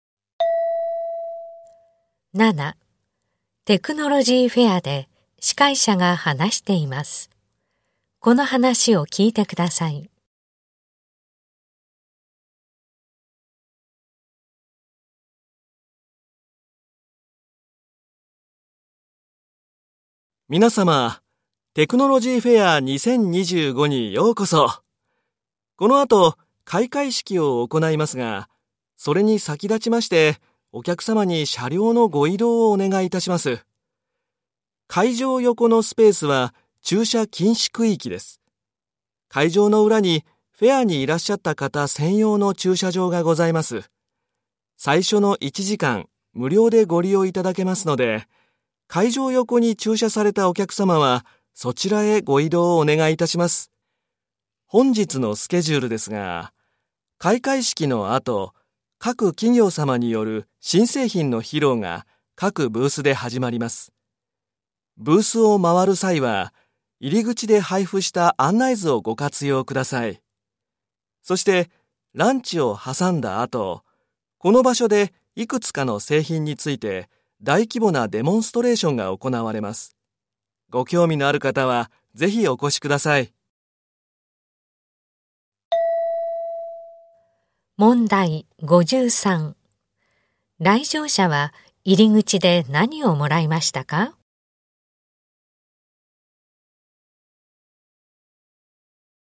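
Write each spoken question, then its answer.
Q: 来場者は入り口で何をもらいましたか?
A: 案内図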